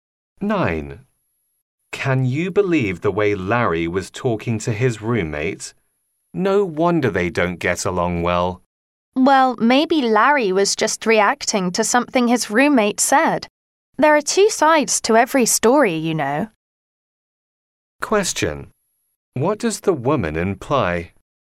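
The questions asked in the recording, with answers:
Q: What does the woman imply?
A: Larry may not be the only one to blame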